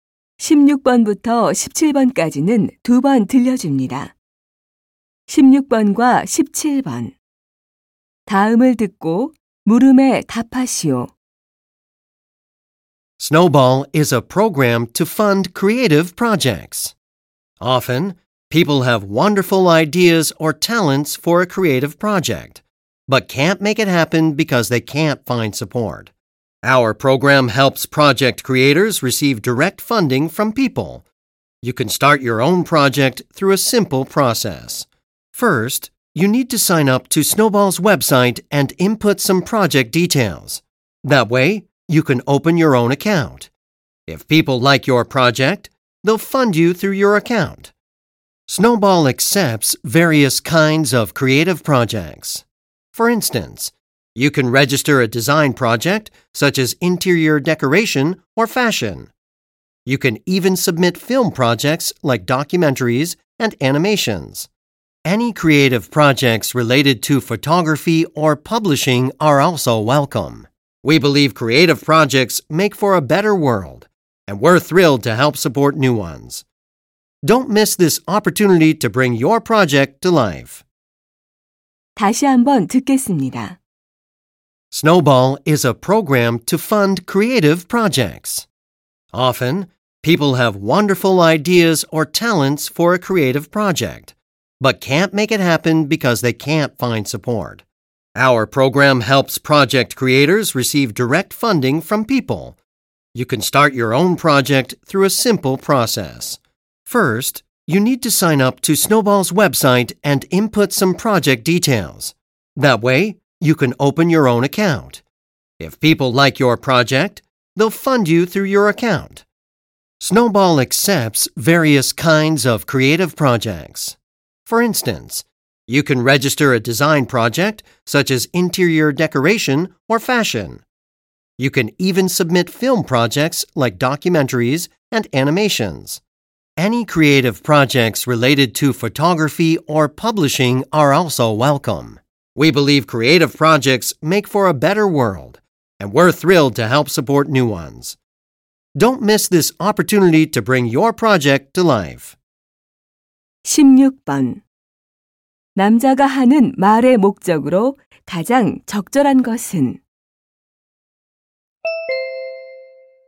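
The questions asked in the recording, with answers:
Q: 남자가 하는 말의 목적으로 가장 적절한 것은?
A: 창작 프로젝트 후원 프로그램을 홍보하려고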